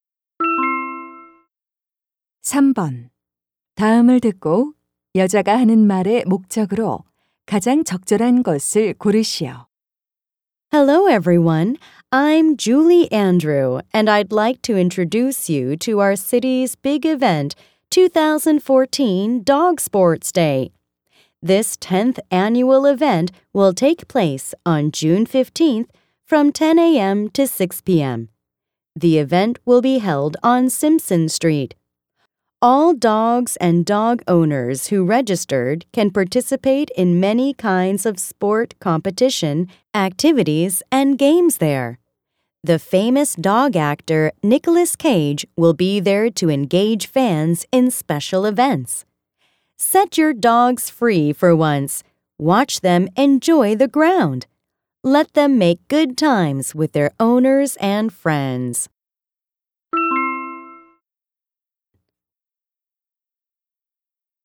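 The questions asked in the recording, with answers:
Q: 다음을 듣고 여자가 하는 말의 목적으로 가장 적절한 것을 고르시오.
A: 2014 Dog Sports Day 행사를 홍보하려고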